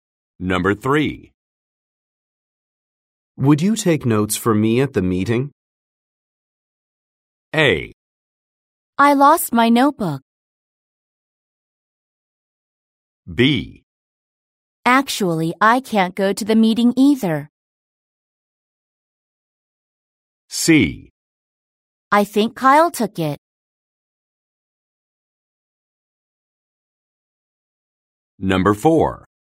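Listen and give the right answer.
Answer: B: Actually, I can't go to the meeting either.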